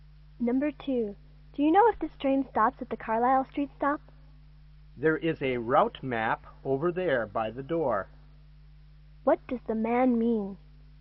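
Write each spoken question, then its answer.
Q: What does the man mean?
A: The woman should check the route map.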